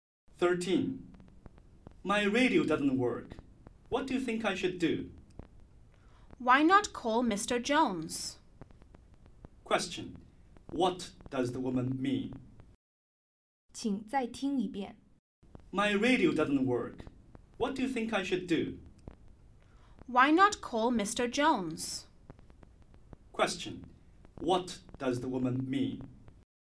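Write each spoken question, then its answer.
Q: What does the woman mean?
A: The man should call Mr. Jones to fix the radio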